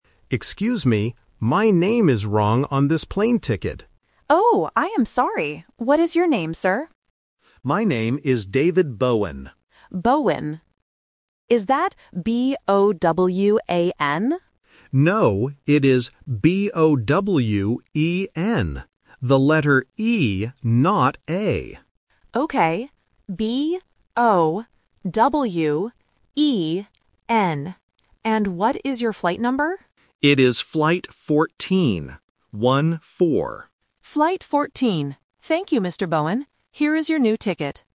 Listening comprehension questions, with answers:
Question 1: What is the problem with the ticket?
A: The name is wrong.

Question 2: How do you spell the passenger's last name?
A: B-O-W-E-N

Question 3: What is the passenger's flight number?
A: 14